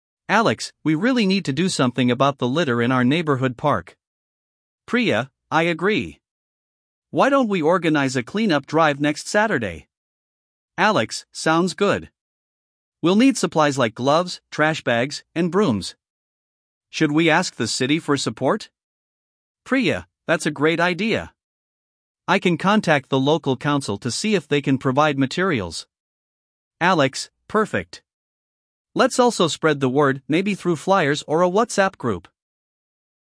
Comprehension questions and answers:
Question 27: What problem are Alex and Priya discussing?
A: Litter in the park

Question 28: When do they plan to organize the clean-up drive?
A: Next Saturday

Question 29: What supplies do they need?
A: Gloves, trash bags, brooms

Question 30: Who will Priya contact for support?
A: Local council

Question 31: How will they inform the community about the drive?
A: Flyers or WhatsApp group

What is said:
Alex: We really need to do something about the litter in our neighborhood park.
Priya: I agree. Why don't we organize a clean-up drive next Saturday?
Alex: Sounds good. We'll need supplies like gloves, trash bags, and brooms. Should we ask the city for support?
Priya: That's a great idea! I can contact the local council to see if they can provide materials.
Alex: Perfect. Let's also spread the word—maybe through flyers or a WhatsApp group?